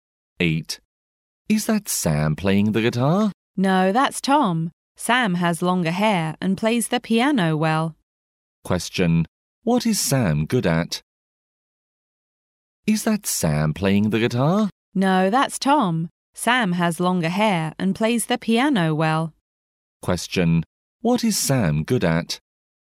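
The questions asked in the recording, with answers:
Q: Question. What is Sam good at?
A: Playing the piano.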